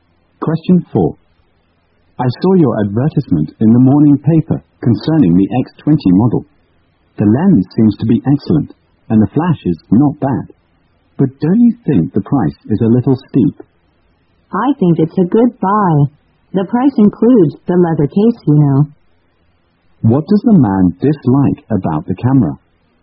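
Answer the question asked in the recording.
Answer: The price is too high.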